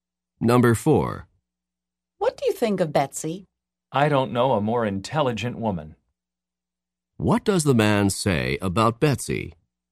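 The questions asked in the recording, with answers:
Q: What does the man say about Betsy?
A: She is the most intelligent woman he knows.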